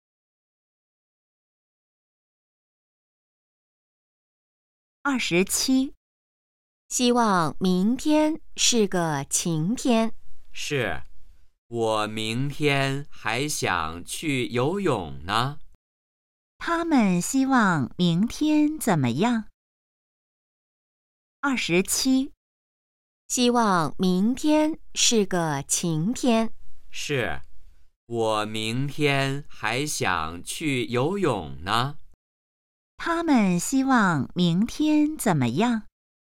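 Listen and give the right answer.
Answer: 是晴天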